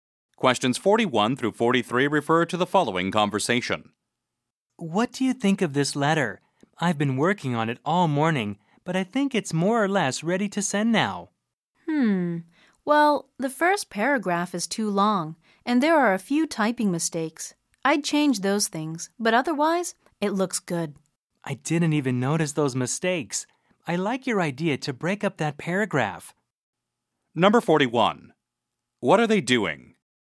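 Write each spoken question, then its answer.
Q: What are they doing?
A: Reviewing a letter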